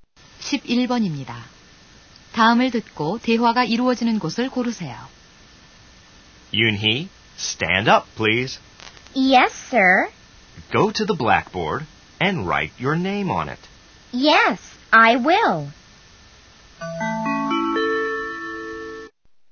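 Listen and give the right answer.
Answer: 교실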